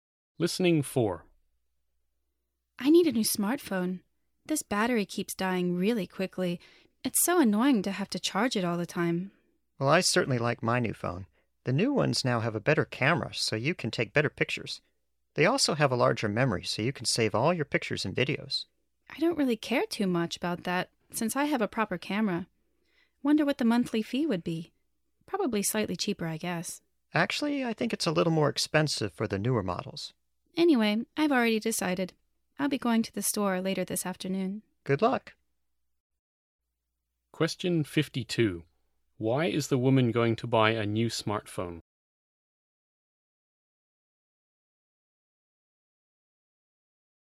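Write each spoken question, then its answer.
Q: Why is the woman going to buy a new smartphone?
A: Her battery dies too quickly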